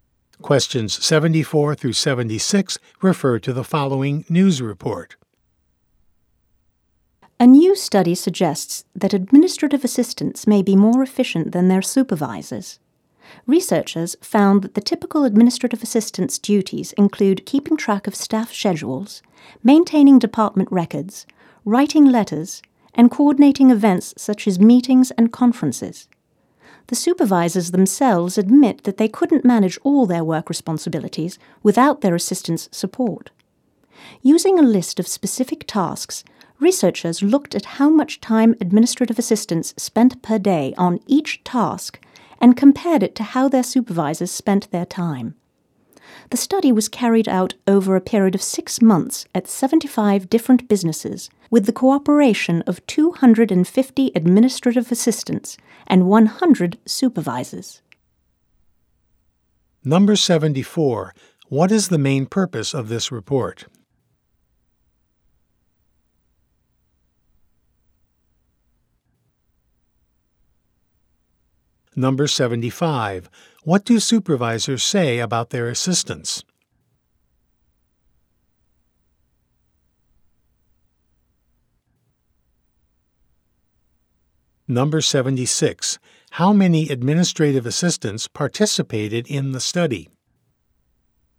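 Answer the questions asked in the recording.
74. To describe a study comparing administrative assistants' efficiency with their supervisors'
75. They couldn't manage their work without their assistants' support
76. 250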